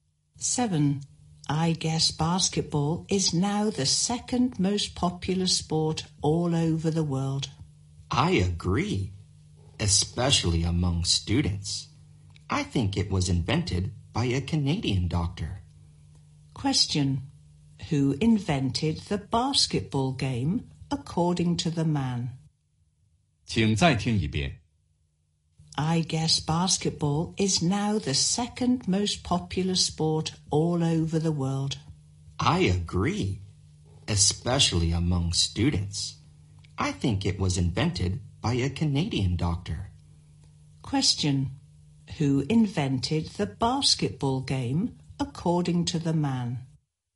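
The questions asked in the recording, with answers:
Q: Who invented the basketball game, according to the man?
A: A Canadian doctor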